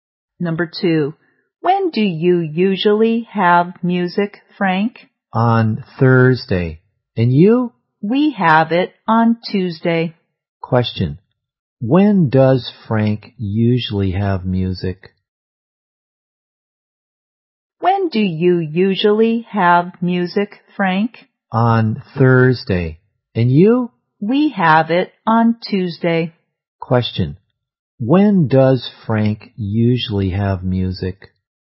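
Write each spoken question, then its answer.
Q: when does Frank usually have music?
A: On Thursday.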